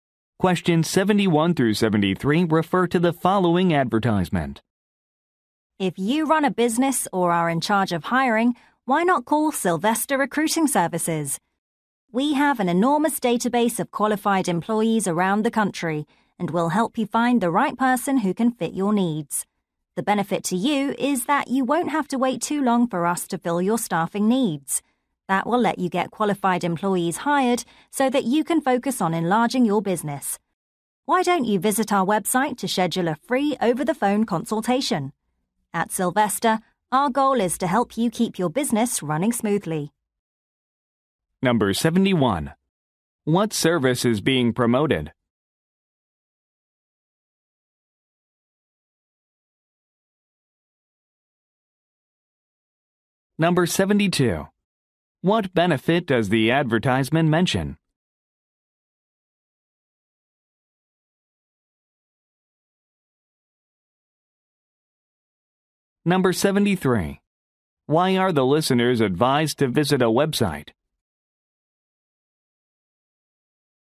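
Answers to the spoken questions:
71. Recruiting (staffing) services
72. Staffing needs are filled quickly
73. To schedule a free phone consultation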